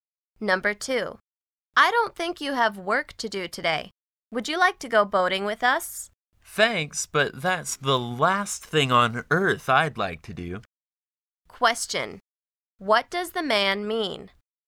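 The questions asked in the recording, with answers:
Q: What does the man mean?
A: He doesn't want to go boating at all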